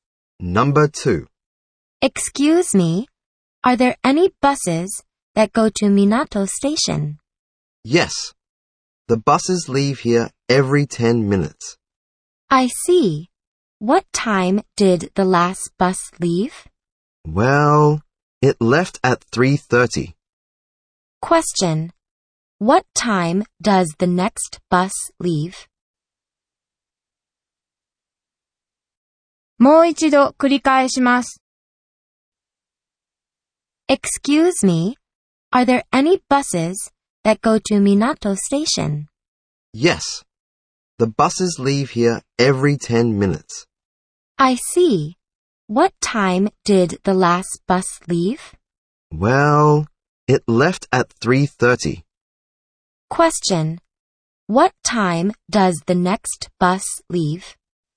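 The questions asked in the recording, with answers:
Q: What time does the next bus leave?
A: At 3:40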